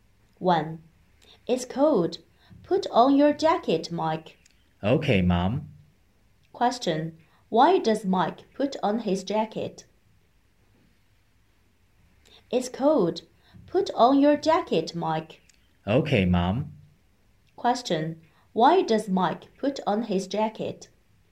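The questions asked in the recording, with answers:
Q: Why does Mike put on his jacket?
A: Because it's cold.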